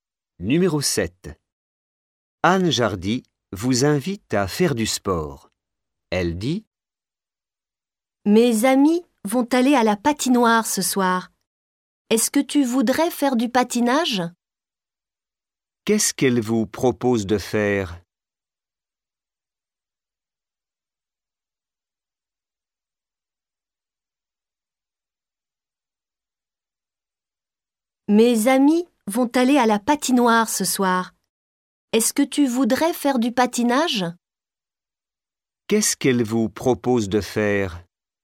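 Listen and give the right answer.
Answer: Du patinage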